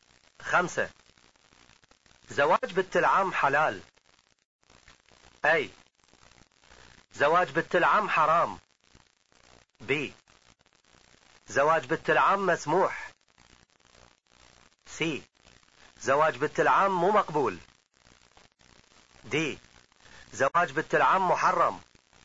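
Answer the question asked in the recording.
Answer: ب: زواج بنت العم مسموح.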